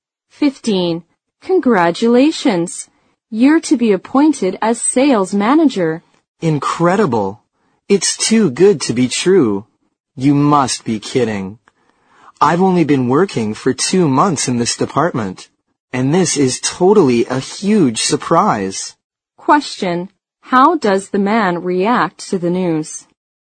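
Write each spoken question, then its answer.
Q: How does the man react to the news?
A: He is very surprised and can hardly believe it.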